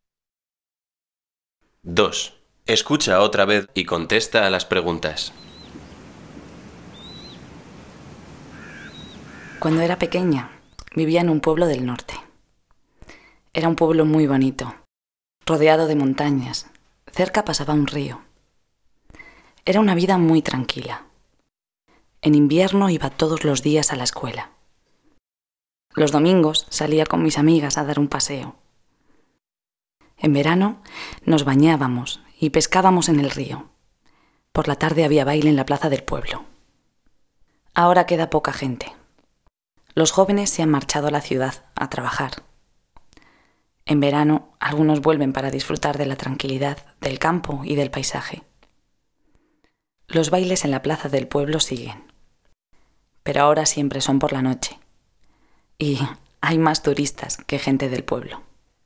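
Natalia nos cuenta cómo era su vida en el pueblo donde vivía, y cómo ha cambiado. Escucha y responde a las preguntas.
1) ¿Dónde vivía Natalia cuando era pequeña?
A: En un pueblo del norte.

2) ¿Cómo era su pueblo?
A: Muy bonito, rodeado de montañas, con un río cerca; una vida muy tranquila.

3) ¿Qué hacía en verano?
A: Se bañaba y pescaba en el río; por la tarde había baile en la plaza.

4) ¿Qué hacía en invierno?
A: Iba todos los días a la escuela.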